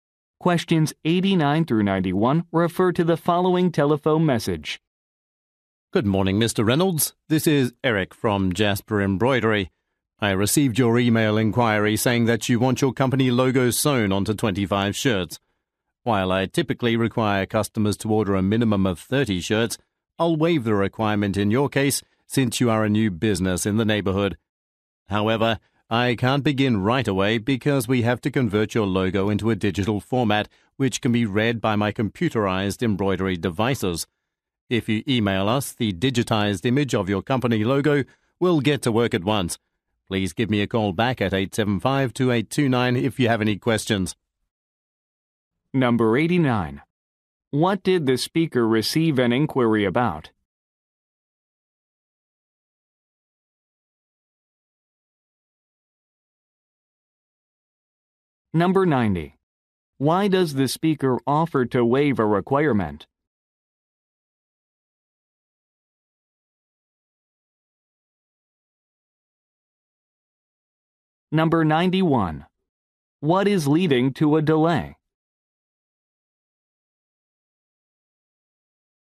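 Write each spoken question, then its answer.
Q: What did the speaker receive an inquiry about?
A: Sewing a company logo onto 25 shirts

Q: Why does the speaker offer to waive a requirement?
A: The customer is a new business in the neighborhood

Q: What is leading to a delay?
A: The logo must be converted to a digital format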